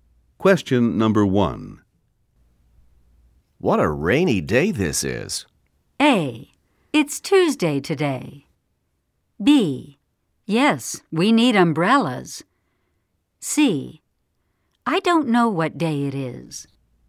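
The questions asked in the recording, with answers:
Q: What a rainy day this is.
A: B: Yes, we need umbrellas.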